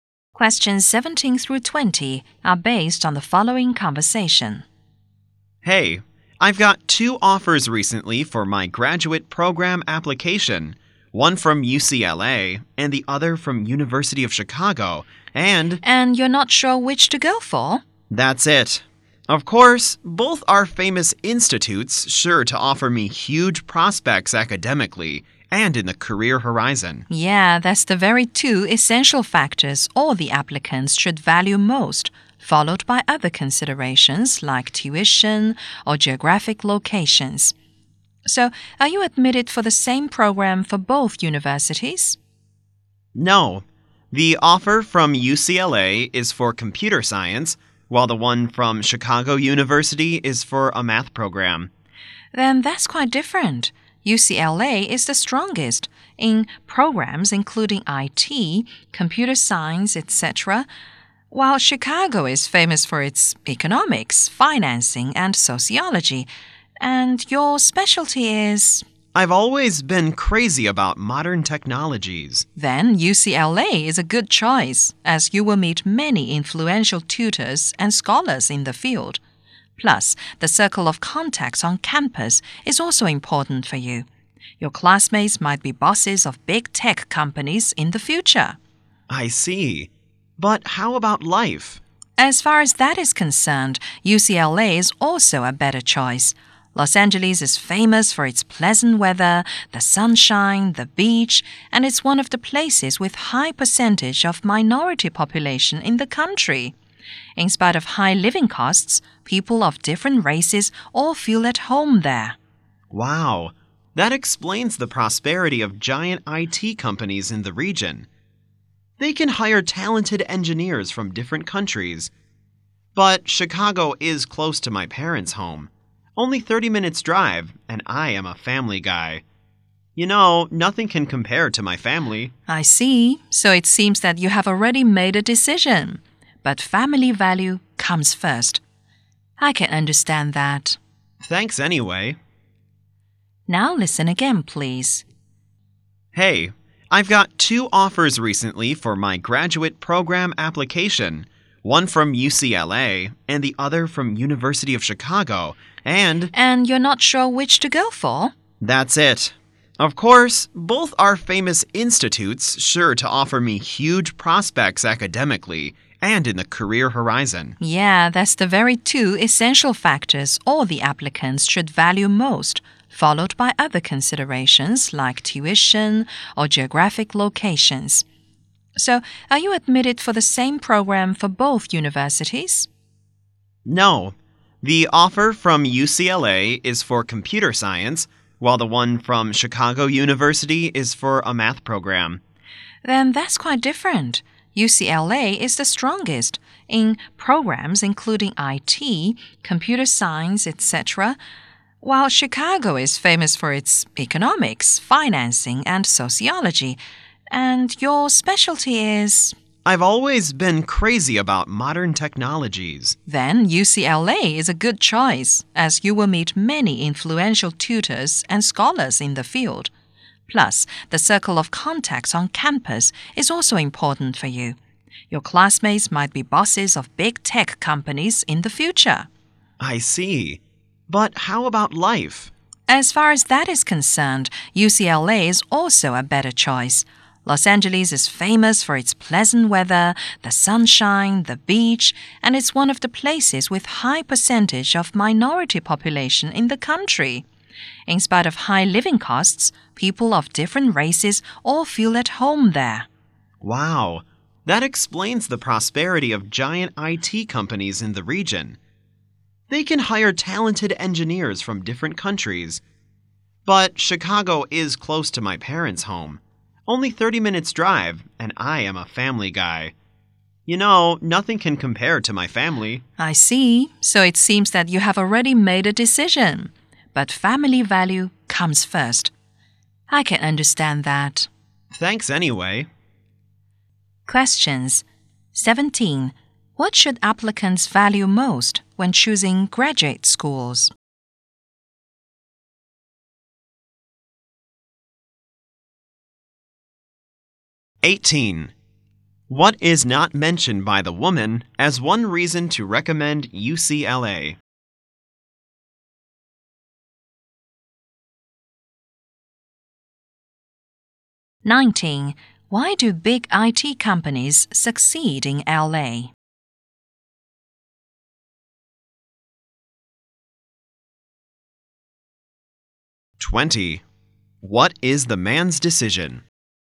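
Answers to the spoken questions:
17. Academic and career prospects
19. They can hire talented engineers from different countries
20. To go to the University of Chicago, near his family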